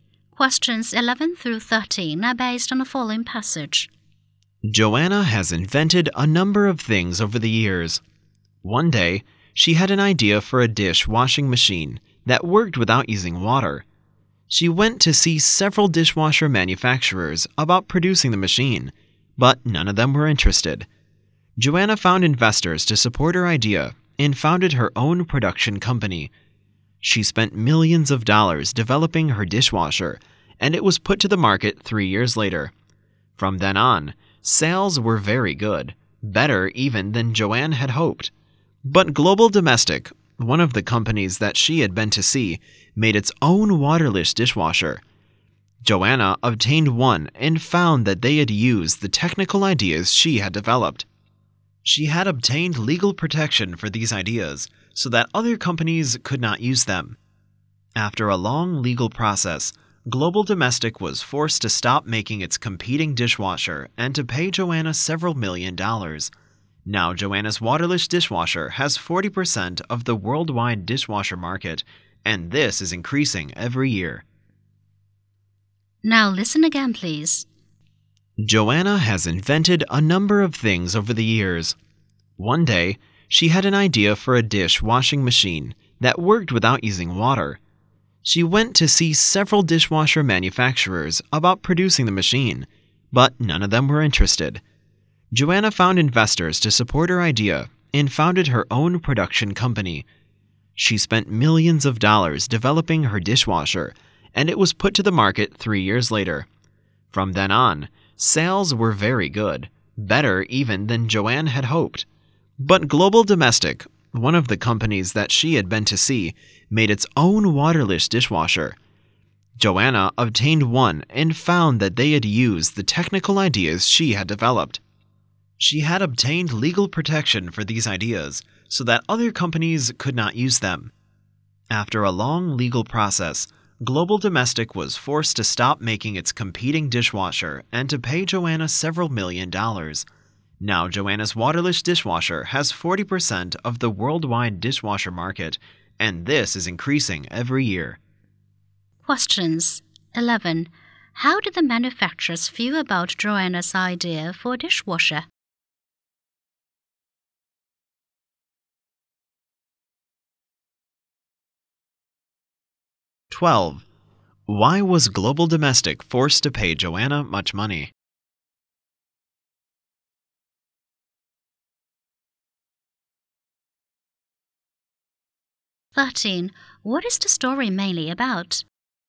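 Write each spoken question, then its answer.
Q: How did the manufacturers feel about Joanna's idea for a dishwasher?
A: They were not interested

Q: Why was Global Domestic forced to pay Joanna much money?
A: It used her legally protected technical ideas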